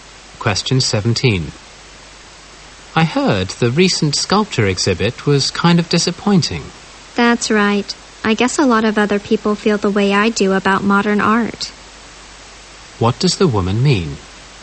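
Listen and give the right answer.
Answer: Many people, like her, don't care for modern art.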